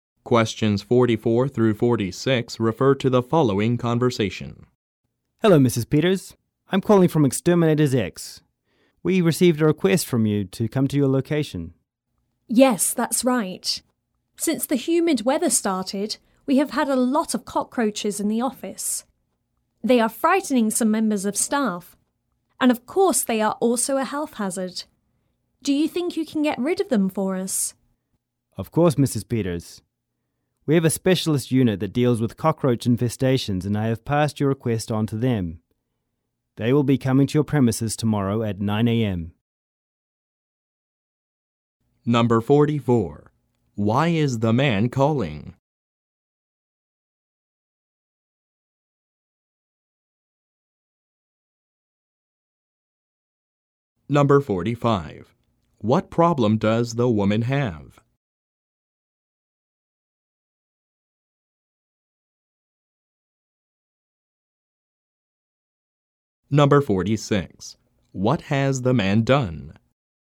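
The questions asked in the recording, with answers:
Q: Why is the man calling?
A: To respond to her request for an exterminator visit

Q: What problem does the woman have?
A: Cockroaches in the office

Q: What has the man done?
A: Passed her request on to the specialist unit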